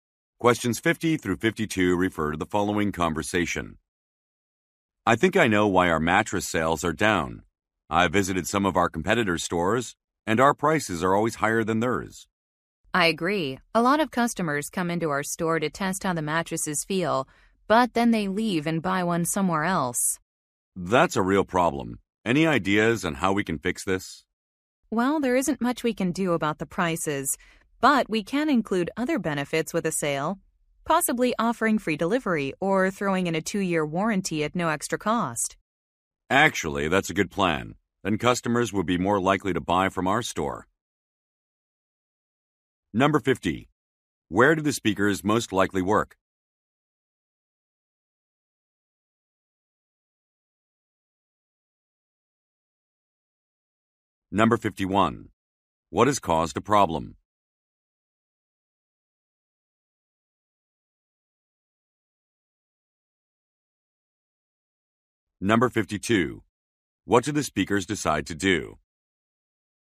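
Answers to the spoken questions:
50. At a mattress store
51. Their prices are higher than competitors'
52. Offer extra benefits such as free delivery or a free warranty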